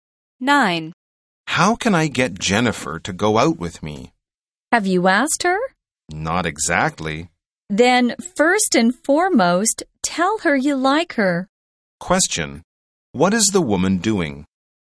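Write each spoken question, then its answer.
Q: What is the woman doing?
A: Giving the man advice on asking Jennifer out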